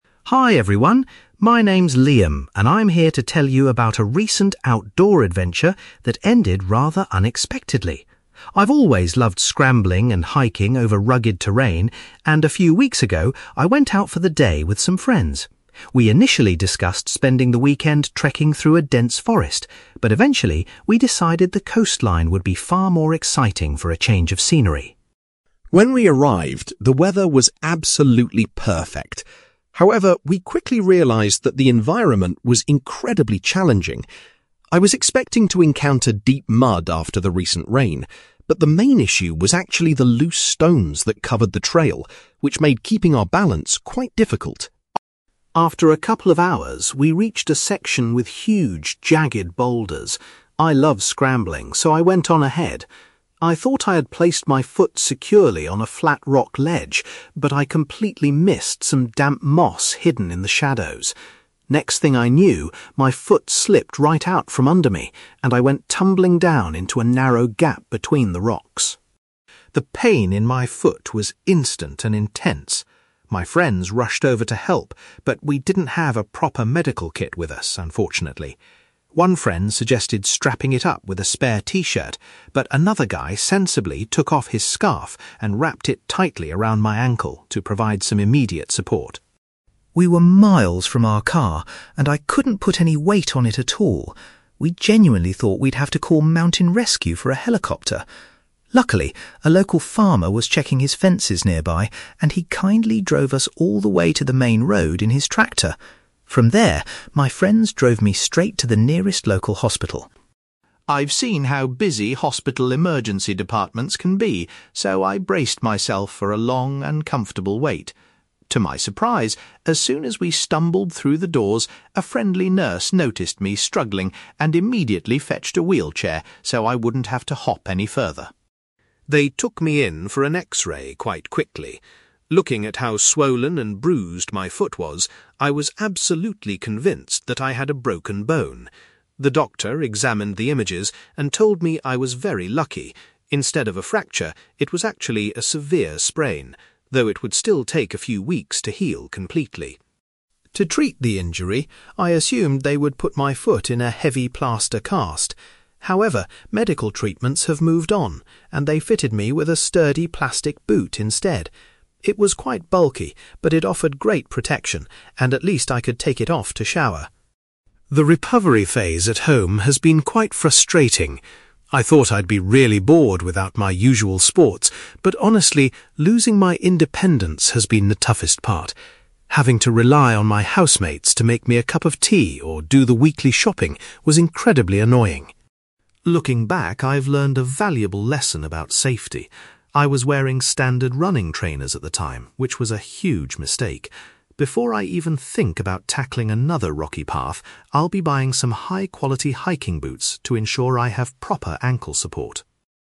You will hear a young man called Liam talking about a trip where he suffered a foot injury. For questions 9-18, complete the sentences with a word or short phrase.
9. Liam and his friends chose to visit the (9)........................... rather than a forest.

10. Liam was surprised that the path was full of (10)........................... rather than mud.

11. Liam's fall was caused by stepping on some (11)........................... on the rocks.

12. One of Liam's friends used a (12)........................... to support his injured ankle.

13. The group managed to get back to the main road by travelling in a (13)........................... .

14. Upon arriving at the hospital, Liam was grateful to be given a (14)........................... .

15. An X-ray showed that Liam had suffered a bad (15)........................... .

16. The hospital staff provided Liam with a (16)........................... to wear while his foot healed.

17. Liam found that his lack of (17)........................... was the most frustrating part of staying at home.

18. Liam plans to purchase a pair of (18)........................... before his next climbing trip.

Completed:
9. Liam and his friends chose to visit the coastline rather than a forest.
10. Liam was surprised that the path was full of loose stones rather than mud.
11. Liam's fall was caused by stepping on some damp moss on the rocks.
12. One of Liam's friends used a scarf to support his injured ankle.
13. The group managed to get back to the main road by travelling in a tractor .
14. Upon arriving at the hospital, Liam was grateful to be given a wheelchair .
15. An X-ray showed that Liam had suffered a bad sprain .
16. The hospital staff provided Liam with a plastic boot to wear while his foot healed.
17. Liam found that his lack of independence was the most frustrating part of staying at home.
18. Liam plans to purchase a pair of hiking boots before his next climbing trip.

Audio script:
Liam: Hi everyone! My name is Liam, and I'm here to tell you about a recent outdoor adventure that ended rather unexpectedly. I've always loved scrambling and hiking over rugged terrain, and a few weeks ago, I went out for the day with some friends. We initially discussed spending the weekend trekking through a dense forest, but eventually, we decided the coastline would be far more exciting for a change of scenery.
When we arrived, the weather was absolutely perfect. However, we quickly realised that the environment was incredibly challenging. I was expecting to encounter deep mud after the recent rain, but the main issue was actually the loose stones that covered the trail, which made keeping our balance quite difficult.
After a couple of hours, we reached a section with huge, jagged boulders. I love scrambling, so I went on ahead. I thought I had placed my foot securely on a flat rock ledge, but I completely missed some damp moss hidden in the shadows. Next thing I knew, my foot slipped right out from under me, and I went tumbling down into a narrow gap between the rocks.
The pain in my foot was instant and intense. My friends rushed over to help, but we didn't have a proper medical kit with us, unfortunately. One friend suggested strapping it up with a spare t-shirt, but another guy sensibly took off his scarf and wrapped it tightly around my ankle to provide some immediate support.
We were miles from our car, and I couldn't put any weight on it at all. We genuinely thought we'd have to call mountain rescue for a helicopter. Luckily, a local farmer was checking his fences nearby, and he kindly drove us all the way to the main road in his tractor. From there, my friends drove me straight to the nearest local hospital.
I've seen how busy hospital emergency departments can be, so I braced myself for a long, uncomfortable wait. To my surprise, as soon as we stumbled through the doors, a friendly nurse noticed me struggling and immediately fetched a wheelchair so I wouldn't have to hop any further.
They took me in for an X-ray quite quickly. Looking at how swollen and bruised my foot was, I was absolutely convinced that I had a broken bone. The doctor examined the images and told me I was very lucky; instead of a fracture, it was actually a severe sprain, though it would still take a few weeks to heal completely.
To treat the injury, I assumed they would put my foot in a heavy plaster cast. However, medical treatments have moved on, and they fitted me with a sturdy plastic boot instead. It was quite bulky, but it offered great protection and at least I could take it off to shower.
The recovery phase at home has been quite frustrating. I thought I'd be really bored without my usual sports, but honestly, losing my independence has been the toughest part. Having to rely on my housemates to make me a cup of tea or do the weekly shopping was incredibly annoying.
Looking back, I've learned a valuable lesson about safety. I was wearing standard running trainers at the time, which was a huge mistake. Before I even think about tackling another rocky path, I'll be buying some high-quality hiking boots to ensure I have proper ankle support.

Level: B2